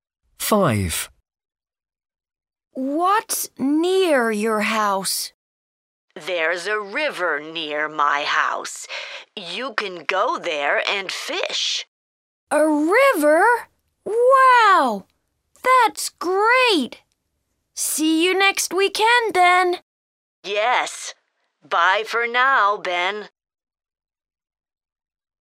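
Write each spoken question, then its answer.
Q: What's near your house?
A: a river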